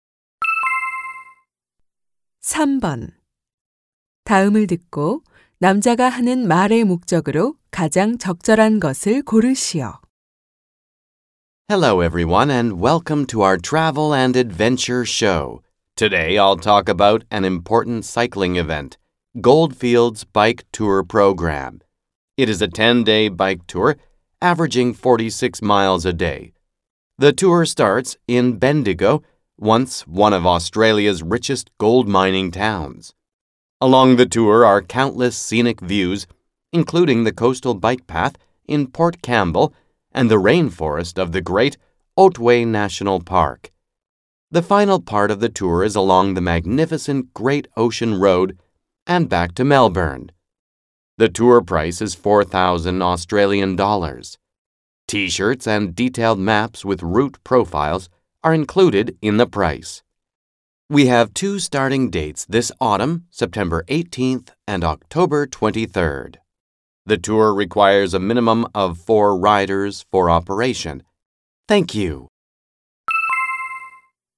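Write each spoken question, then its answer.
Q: 다음을 듣고 남자가 하는 말의 목적으로 가장 적절한 것을 고르시오.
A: 골드필즈 자전거 여행 프로그램을 소개하려고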